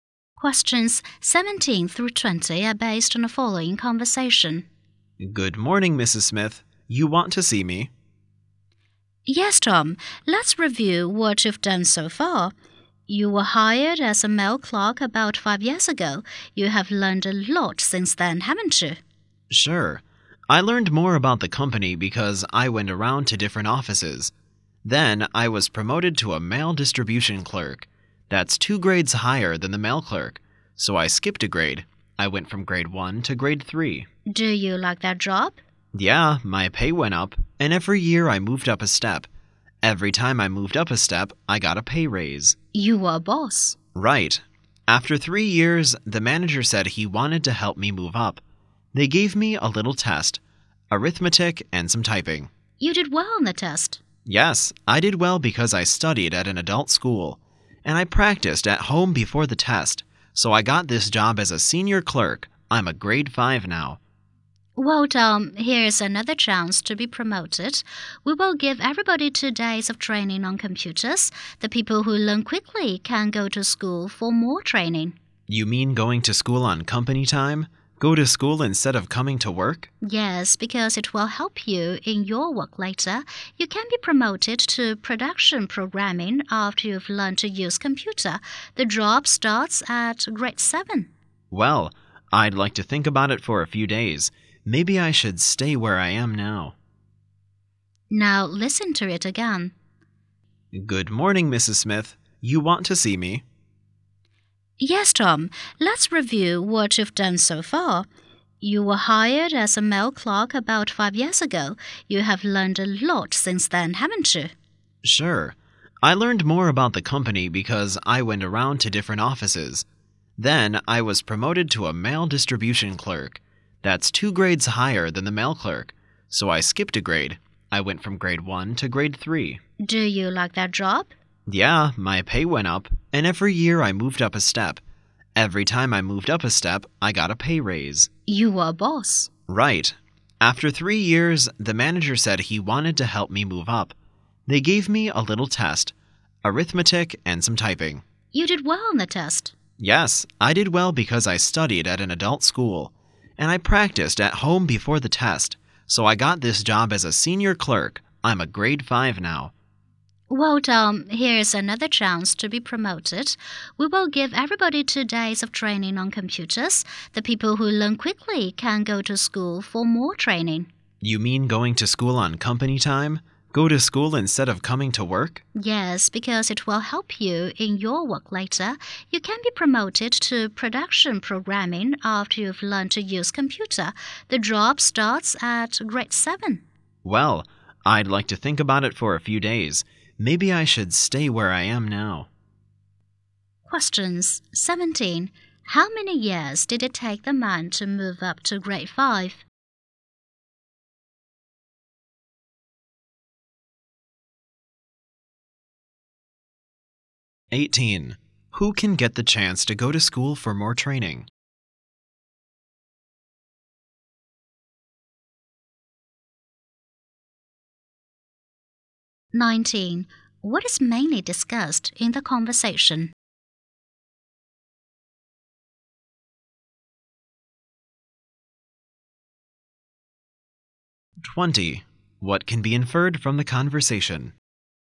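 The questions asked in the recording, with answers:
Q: Who can get the chance to go to school for more training?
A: Those who learn computers quickly

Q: What is mainly discussed in the conversation?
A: Tom's career progress and a chance of promotion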